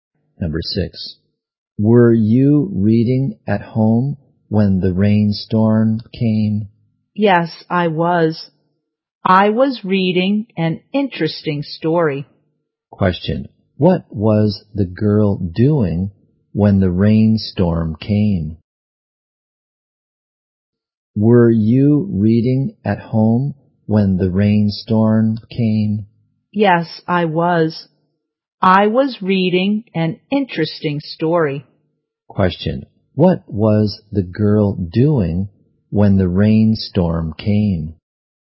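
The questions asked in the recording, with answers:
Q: what was the girl doing when the rainstorm came?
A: Reading an interesting story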